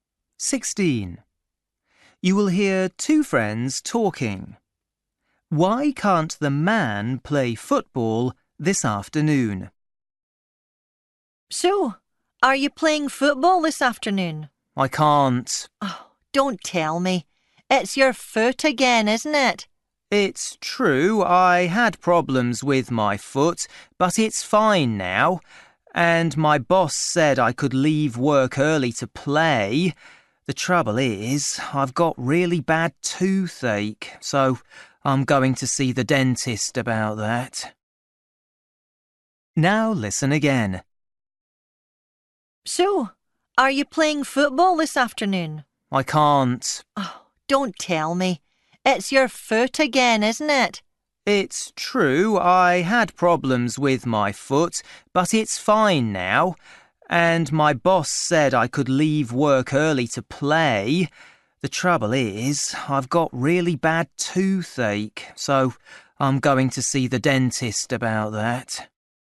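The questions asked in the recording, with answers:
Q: Why can't the man play football this afternoon?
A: He has toothache and is going to the dentist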